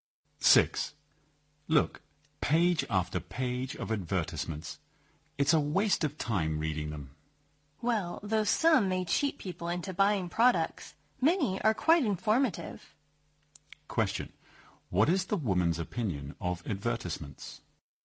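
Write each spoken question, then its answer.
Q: What is the woman's opinion of advertisements?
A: Many are quite informative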